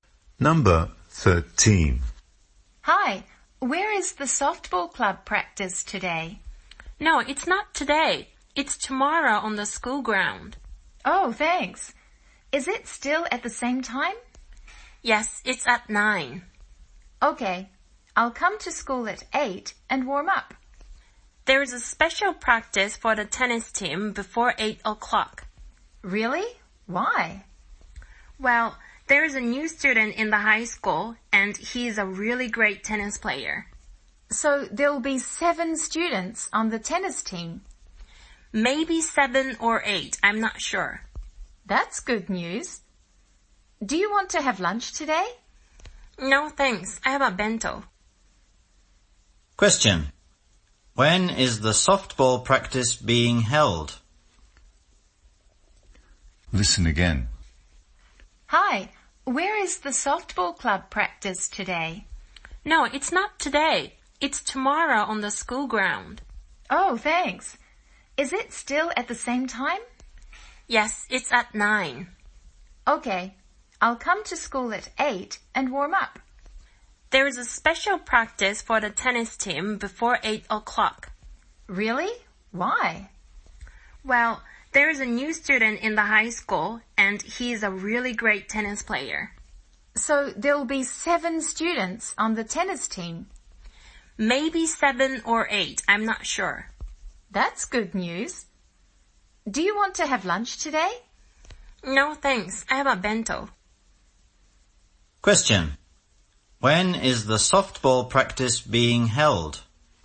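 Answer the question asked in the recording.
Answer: Tomorrow at 9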